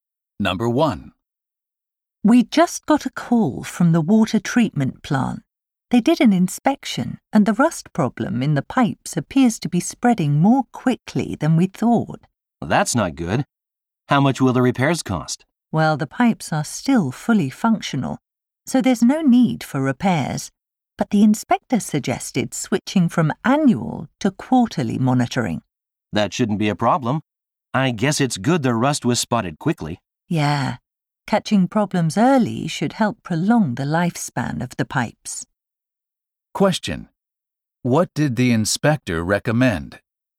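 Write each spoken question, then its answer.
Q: What did the inspector recommend?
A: Monitoring the pipes quarterly instead of once a year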